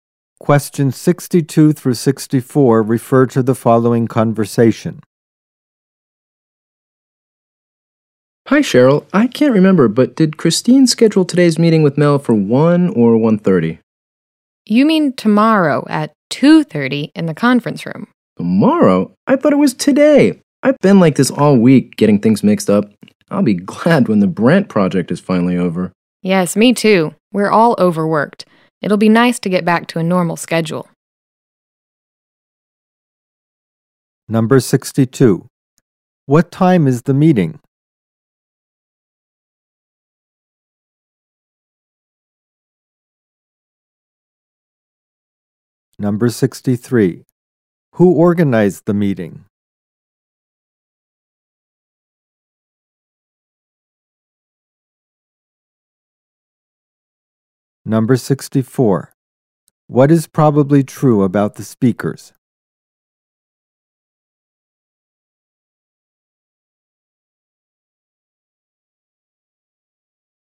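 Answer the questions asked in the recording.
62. Tomorrow at 2:30
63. Christine
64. They are overworked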